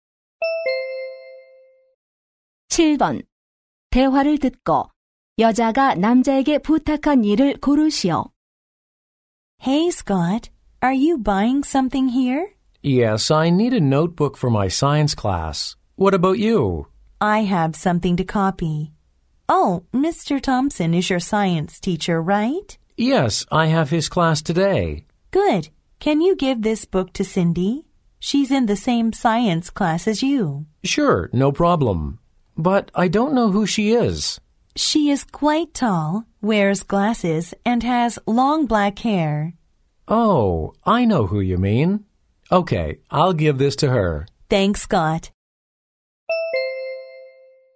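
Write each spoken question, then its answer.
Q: 대화를 듣고 여자가 남자에게 부탁한 일을 고르시오.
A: Cindy에게 책 전해 주기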